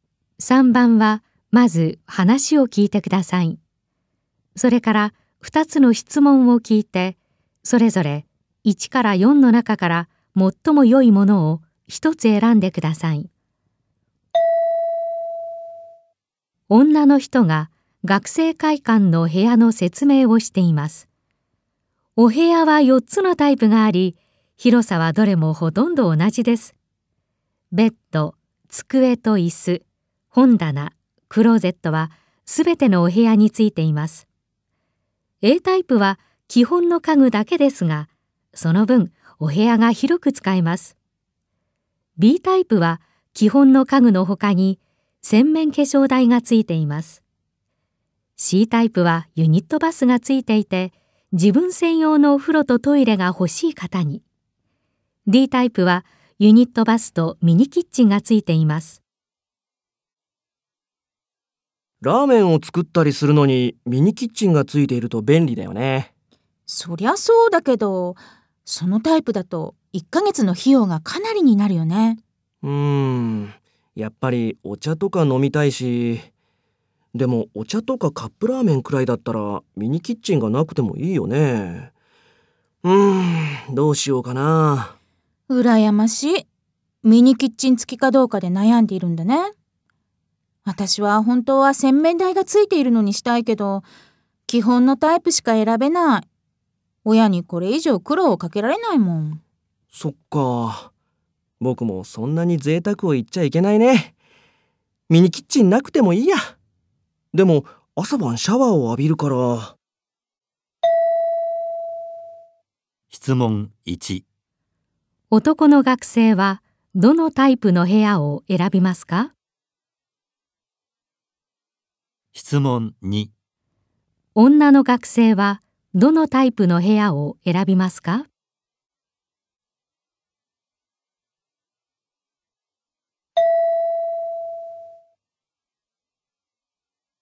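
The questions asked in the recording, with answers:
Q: 男の学生はどのタイプの部屋を選びますか?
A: Cタイプ

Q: 女の学生はどのタイプの部屋を選びますか?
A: Aタイプ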